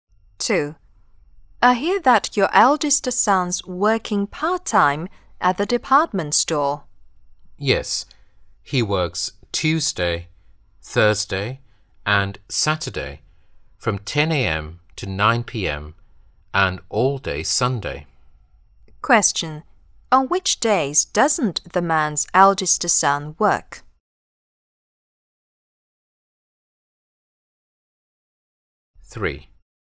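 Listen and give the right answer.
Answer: Monday, Wednesday and Friday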